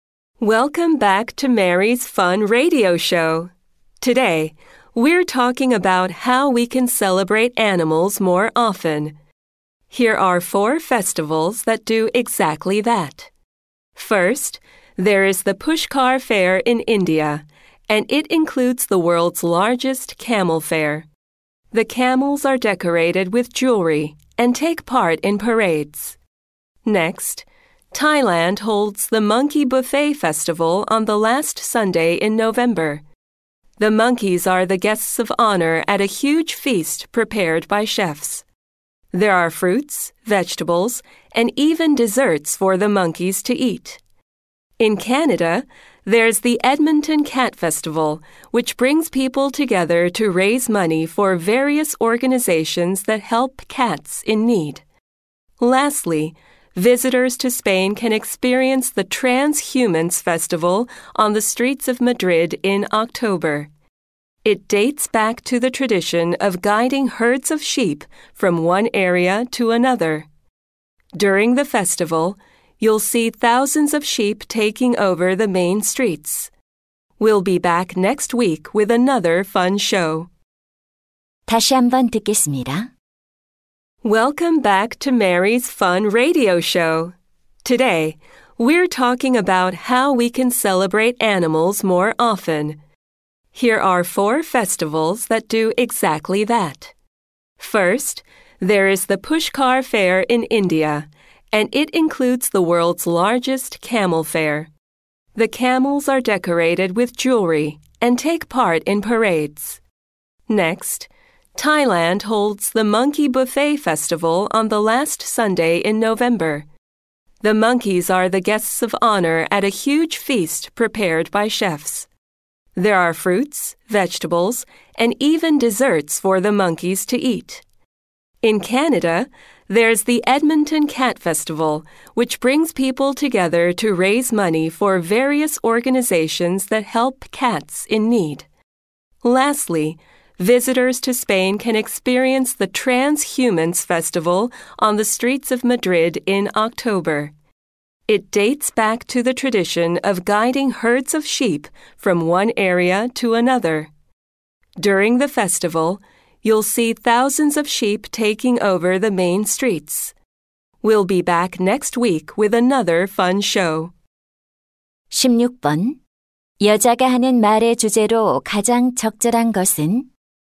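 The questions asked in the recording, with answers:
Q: 여자가 하는 말의 주제로 가장 적절한 것은?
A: 동물을 기념하는 세계의 축제들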